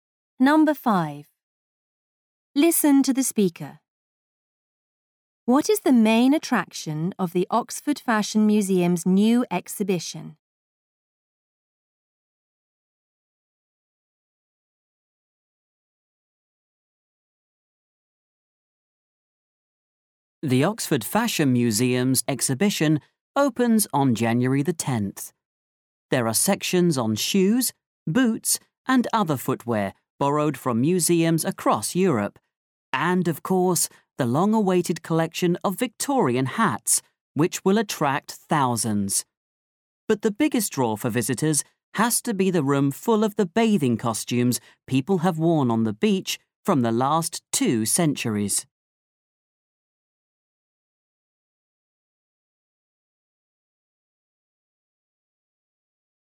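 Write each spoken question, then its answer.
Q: What is the main attraction of the Oxford Fashion Museum's new exhibition?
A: The room of bathing costumes from the last two centuries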